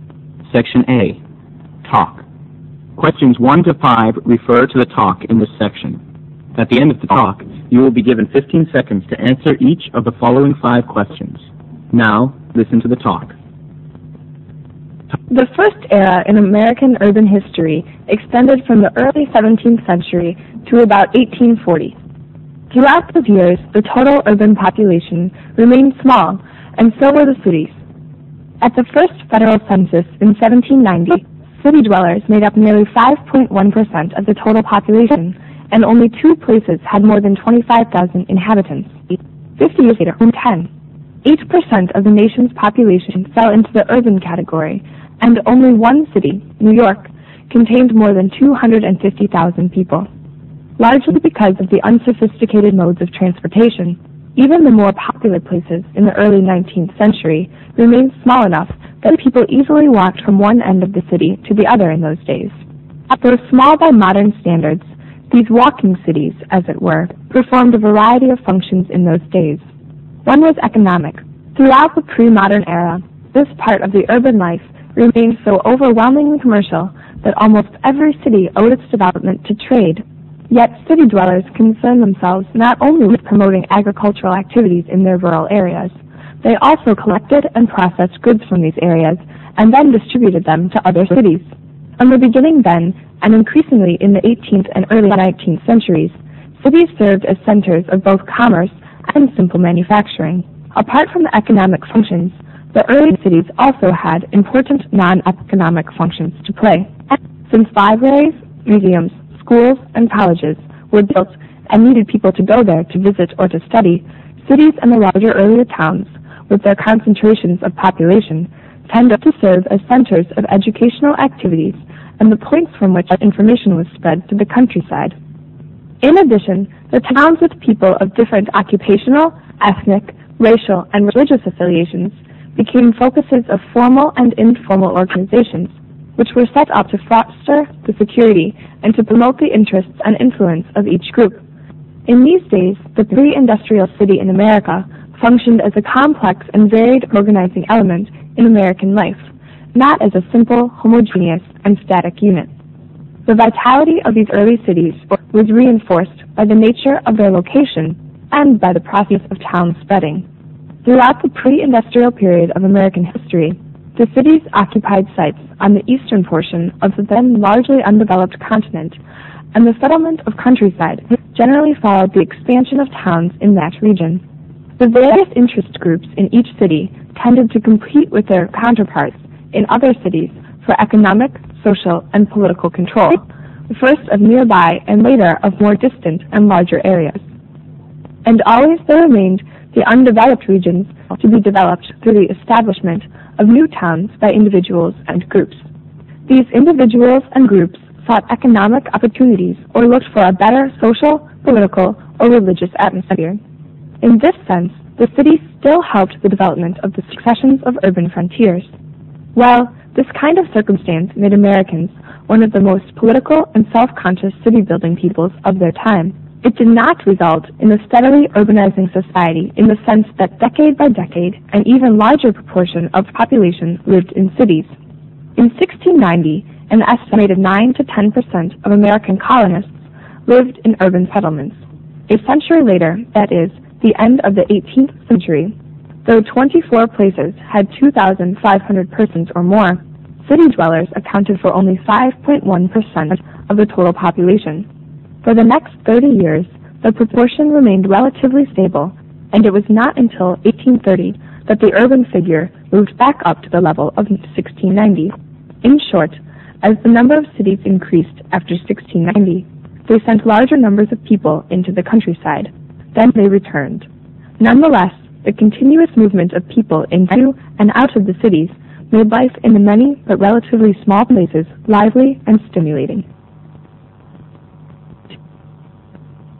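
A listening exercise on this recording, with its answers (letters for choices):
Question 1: According to the passage, during the 18th and 19th centuries cities were small in size mainly because .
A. the urban population was stable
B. few people lived in cities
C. transport was backward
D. it was originally planned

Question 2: Cities survived in those days largely as a result of .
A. the trade activities they undertook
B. the agriculture activities in the nearby areas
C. their relatively small size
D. the non-economic roles they played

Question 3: City dwellers were engaged in all the following economic activities EXCEPT ______.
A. commerce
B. distribution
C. processing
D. transportation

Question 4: Urban people left cities for the following reasons EXCEPT .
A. more economic opportunities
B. a freer social and political environment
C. more educational opportunities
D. a more relaxed religious environment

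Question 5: Why did the early cities fail to grow as quickly as expected throughout the 18th century?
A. Because the countryside attracted more people.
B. Because cities did not increase in number.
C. Because the functions of the cities changed.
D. Because the number of city people was stable.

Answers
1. C
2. A
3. D
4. C
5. A

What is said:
SECTION A TALK
The first area in American urban history extended from the early 17th century to about 1840. Throughout those years the total urban population remained small and so with the cities. At the first federal censors in 1790, city dwellers made up nearly 5.1% of the total population and only two places had more than 25000 inhabitants. Fifty years later only 10.8% of the national population fell into the urban category and only one city, New York, contained more than 250000 people. Largely because of the unsophisticated modes of transportation, even the more populous phrases in the early 19th century remained small enough that people could easily work from one end of the city to the other in those days.
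Though smaller in modern standards these working cities, as it were, performed variety of functions in those days. One was economic. Throughout the pre-modern era, this part of urban life remained so overwhelmingly commercial that almost every city owed its development to trade.
Yet city dwellers concerned themselves not only with promoting agricultural activities in their own areas, they also collected and processed goods from these areas and distributed them to other cities. From the beginning line and increasingly in the 18th and early 19th centuries, city served as centres of both commerce and simple manufacturing.
Apart from the economical functions, the early cities also had important non-economic functions to play. Since libraries, museums, schools and colleges were built and needed people to go there to visit or to study, cities and the large early towns with their concentrations of population tended to serve as centres of educational activities and its policy from which information were spread to the countryside. 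In addition, the town with people of different occupational, ethnic, racial and religious filiation became focuses of formal and informal organizations which were set up to foster the security and to promote the interests and influence of each group. In these days the pre-industrial city in America functioned as a complex and varied organizing element in American life, not as a simple, homogeneous and sturdy union.
The varieties of these early cities were reinforced by the nature of their location and by the process of town spreading. Throughout the pre-industrial period of American history, the city occupied sites on the eastern portion of the then largely under-developed continent, and settlement on the countryside generally followed the expansion of towns in that region. The various interest groups in each city tended to compete with their counterparts in other cities for economic, social and political control first nearby and later more distant and larger areas. 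And always there remained the underdeveloped regions to be developed through the establishment of new towns by individuals and groups. These individuals and groups sought economic opportunities or looked for a better social, political or religious atmosphere. In this sense, the cities builder had development of succession of urban frontiers. While this kind of circumstance made Americans one of the most prolific and self-conscious city building peoples of their time, it did not resort the steadily urbanizing society in the sense that decade by decade and ever larger proportion of the people lived in cities.
In 1690 an estimated 9 to 10 percent of American colonists lived in urban settlements. A century later, that was the end of the 18th century, though 24 places had 2 500 persons or more, city dwellers accounted for only 5.1% of the total population. For the next thirty years, the proportion remained relatively stable and it was not until the 1830 did the urban figure moved back up to the level of 1690.
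In short, as the number of cities increased after 1690, they sent large number of people into countryside and they retained. Nonetheless the continuous movement of people into and out of the cities made life in the many but relatively small places lively and stimulating.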